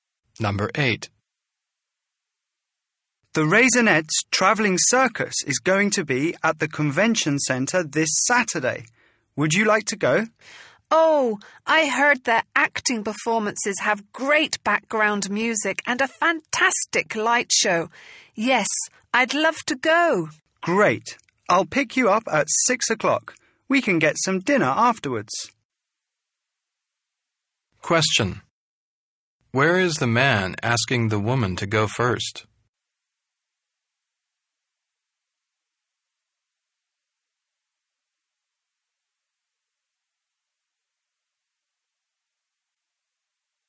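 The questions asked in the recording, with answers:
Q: Where is the man asking the woman to go first?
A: To the circus at the Convention Centre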